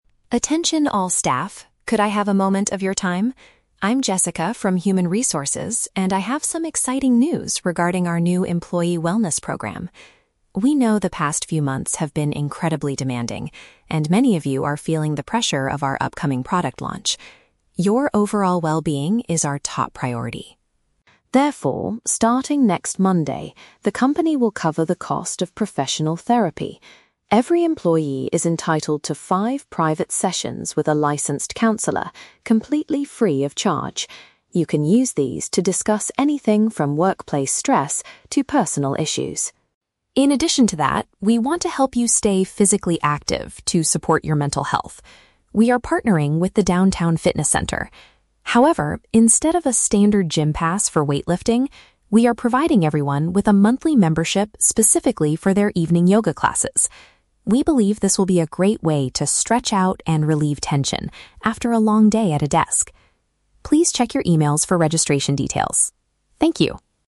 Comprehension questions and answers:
Listen to an announcement from a Human Resources representative. Choose the correct answer (A, B, or C) for each question.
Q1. Why is the company introducing this new wellness program?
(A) To reward employees for successfully releasing a new product.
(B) Because management realized staff are stressed about future work.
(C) Because many workers have been taking too much sick leave lately.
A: (B) Because management realized staff are stressed about future work.

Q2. What is the first benefit that employees will receive?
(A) Five complimentary meetings with a mental health professional.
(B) Extra paid time off to deal with personal and family problems.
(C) Financial bonuses to help them pay for private therapy costs.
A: (A) Five complimentary meetings with a mental health professional.

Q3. What physical activity does the company sponsor for its staff?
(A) Full access to standard gym facilities for weightlifting.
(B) Participation in late-day yoga sessions to relieve tension.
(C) Group stretching and meditation classes held at the office.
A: (B) Participation in late-day yoga sessions to relieve tension.

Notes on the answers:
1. The Key: Jessica says that "many of you are feeling the pressure of our upcoming product launch". This means they are stressed about a project that is happening in the future, matching option B. The Trap (A): The "product launch" is mentioned, but the word "upcoming" means it hasn't happened yet. They are not being rewarded for a successful release (Mentioned but wrong context). The Trap (C): Sick leave is a plausible reason for a company to start a health program, but it is never mentioned in the audio.
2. The Key: Jessica announces that employees get "five private sessions with a licensed counselor, completely free of charge". This is paraphrased perfectly as "five complimentary meetings with a mental health professional". The Trap (C): The audio mentions that the company will "cover the cost", meaning they pay the counselor directly. They do not give employees cash/bonuses to pay for it themselves (Mentioned but wrong context). Plausible Trap (B): "Personal issues" are mentioned as a topic for counseling, but giving employees paid time off is not part of this program.
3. The Key: The company provides a membership specifically for "evening yoga classes". This is paraphrased in the options as "late-day yoga sessions". The Trap (A): A "standard gym pass" and "weightlifting" are mentioned, but Jessica explicitly says they are providing the yoga membership instead of the standard gym pass (Mentioned but rejected). Plausible Trap (C): Stretching and yoga are similar, but the classes are held at the "Downtown Fitness Center", not "at the office".

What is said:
Jessica: Attention all staff, could I have a moment of your time? I'm Jessica from Human Resources, and I have some exciting news regarding our new employee wellness program. We know the past few months have been incredibly demanding, and many of you are feeling the pressure of our upcoming product launch. Your overall well-being is our top priority.
Therefore, starting next Monday, the company will cover the cost of professional therapy. Every employee is entitled to five private sessions with a licensed counselor, completely free of charge. You can use these to discuss anything from workplace stress to personal issues.
In addition to that, we want to help you stay physically active to support your mental health. We are partnering with the Downtown Fitness Center. However, instead of a standard gym pass for weightlifting, we are providing everyone with a monthly membership specifically for their evening yoga classes. We believe this will be a great way to stretch out and relieve tension after a long day at a desk. Please check your emails for registration details. Thank you!

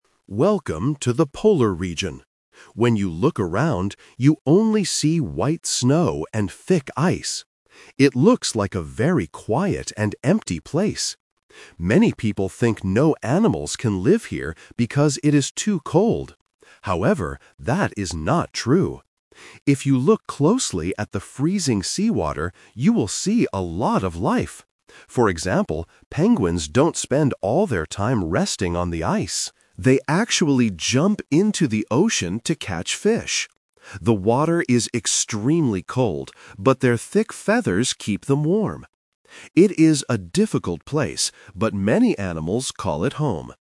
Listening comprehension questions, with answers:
Listen to a narrator in a nature documentary. Choose the correct answer (A, B, or C) for each question.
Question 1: What can you see everywhere in the polar region?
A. Green plants and trees.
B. Snow and ice.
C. Tall mountains.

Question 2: What do many people mistakenly think about this place?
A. They think the water is warm.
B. They think it is completely dark.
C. They think no animals can live there.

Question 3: Where do penguins actually catch their food?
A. On top of the ice.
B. In the freezing seawater.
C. Under the snow.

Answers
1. B. Snow and ice.
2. C. They think no animals can live there.
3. B. In the freezing seawater.

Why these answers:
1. Why B is correct: The narrator states clearly at the beginning: "When you look around, you only see white snow and thick ice." Why A & C are wrong: Green plants and mountains are plausible features of nature, but they are not mentioned in this polar region description.
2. Why C is correct: The narrator explicitly points out this common mistake: "Many people think no animals can live here because it is too cold. However, that is not true." Why A & B are wrong: Warm water is the opposite of the truth (the water is freezing). Complete darkness is not mentioned in the audio.
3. Why B is correct: The narrator explains that penguins "jump into the ocean to catch fish" and refers to the "freezing seawater." Why A is a trap: The audio mentions "resting on the ice", but uses the A2 Twist word "actually" to clarify that they catch fish in the ocean, not on the ice. Why C is wrong: Catching food under the snow is never mentioned.

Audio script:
Narrator: Welcome to the polar region. When you look around, you only see white snow and thick ice. It looks like a very quiet and empty place. Many people think no animals can live here because it is too cold. However, that is not true. If you look closely at the freezing seawater, you will see a lot of life. For example, penguins don't spend all their time resting on the ice. They actually jump into the ocean to catch fish. The water is extremely cold, but their thick feathers keep them warm. It is a difficult place, but many animals call it home.

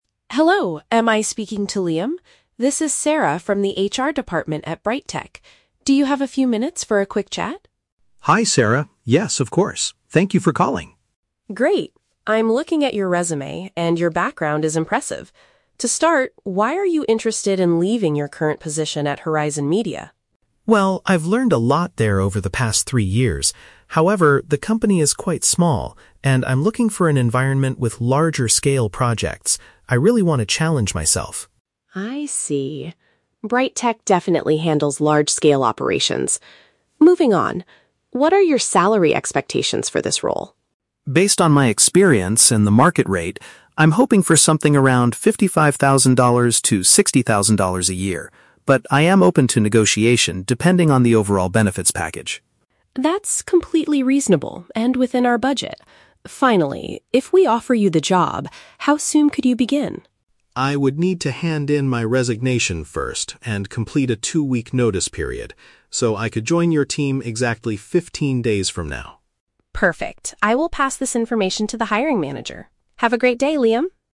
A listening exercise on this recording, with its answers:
Listen to a phone conversation between an HR specialist and a job applicant. Choose the best answer (A, B, or C) for each question.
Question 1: Why does Liam want to leave his current company?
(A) He wants to participate in bigger and more complex tasks.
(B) He is unhappy with his current salary at Horizon Media.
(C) He dislikes the small size of his current office building.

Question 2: What is Liam's attitude toward the starting salary?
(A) He demands a strict minimum of sixty thousand dollars.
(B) He is willing to discuss the number if the extra perks are good.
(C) He refuses to answer until he speaks to the hiring manager.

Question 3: When is the earliest Liam can start working at BrightTech?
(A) Immediately after signing the employment contract.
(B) In about half a month.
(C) In exactly three years.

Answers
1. (A) He wants to participate in bigger and more complex tasks.
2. (B) He is willing to discuss the number if the extra perks are good.
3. (B) In about half a month.

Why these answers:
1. Liam says he is "looking for an environment with larger-scale projects." Paraphrasing: larger-scale projects = bigger and more complex tasks.
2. Liam states that he is "open to negotiation depending on the overall benefits package." Paraphrasing: open to negotiation = willing to discuss; benefits package = extra perks.
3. Liam says he needs to complete a "two-week notice period" and can join "exactly fifteen days from now." Paraphrasing: fifteen days = about half a month.

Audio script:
Sarah: Hello, am I speaking to Liam? This is Sarah from the HR department at BrightTech. Do you have a few minutes for a quick chat?
Liam: Hi Sarah. Yes, of course. Thank you for calling.
Sarah: Great! I'm looking at your resume, and your background is impressive. To start, why are you interested in leaving your current position at Horizon Media?
Liam: Well, I've learned a lot there over the past three years. However, the company is quite small, and I'm looking for an environment with larger-scale projects. I really want to challenge myself.
Sarah: I see. BrightTech definitely handles large-scale operations. Moving on, what are your salary expectations for this role?
Liam: Based on my experience and the market rate, I'm hoping for something around $55,000 to $60,000 a year. But I am open to negotiation depending on the overall benefits package.
Sarah: That's completely reasonable and within our budget. Finally, if we offer you the job, how soon could you begin?
Liam: I would need to hand in my resignation first and complete a two-week notice period. So, I could join your team exactly fifteen days from now.

